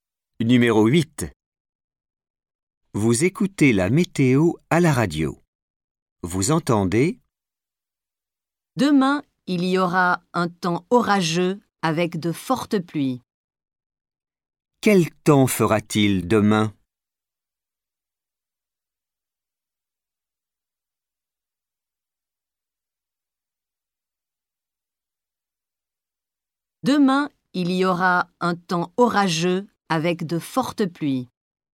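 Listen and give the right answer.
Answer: Orageux avec de fortes pluies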